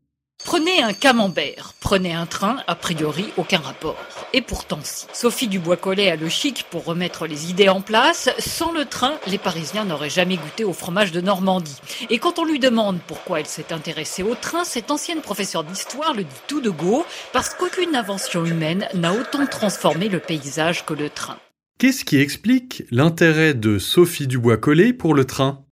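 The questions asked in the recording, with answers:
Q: Qu'est-ce qui explique l'intérêt de Sophie Dubois-Collet pour le train ?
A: Aucune invention humaine n'a autant transformé le paysage que le train.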